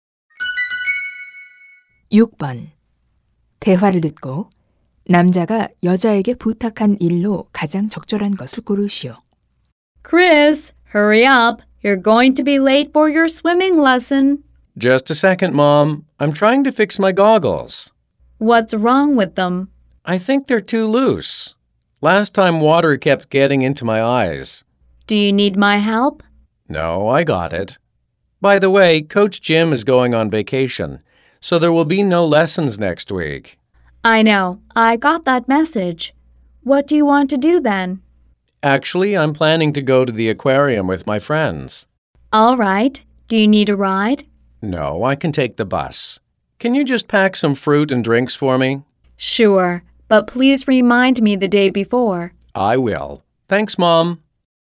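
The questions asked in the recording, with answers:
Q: 대화를 듣고 남자가 여자에게 부탁한 일로 가장 적절한 것을 고르시오.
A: 과일과 음료 챙겨 주기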